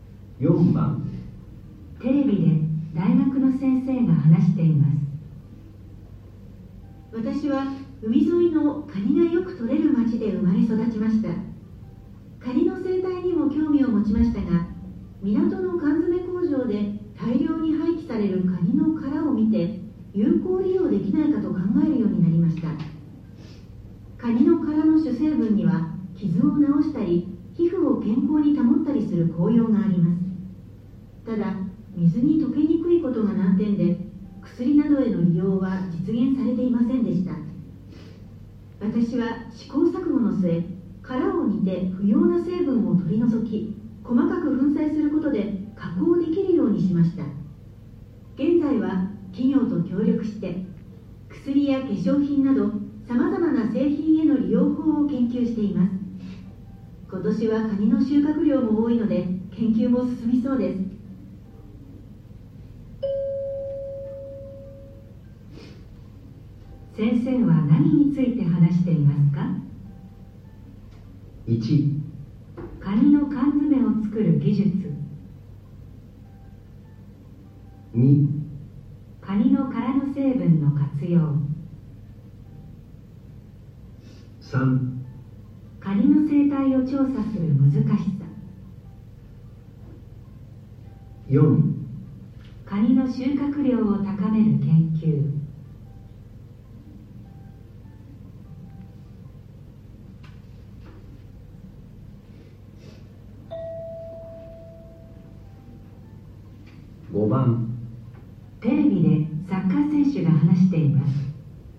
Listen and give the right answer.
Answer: 2

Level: N1 Listening · Test 1